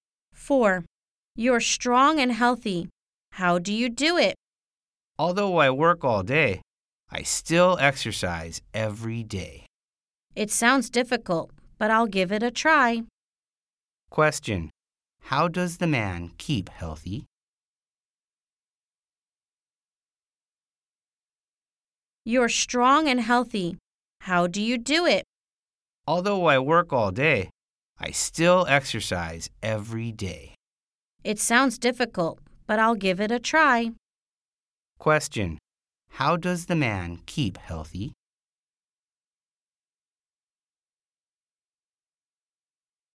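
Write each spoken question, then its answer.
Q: How does the man keep healthy?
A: He exercises every day.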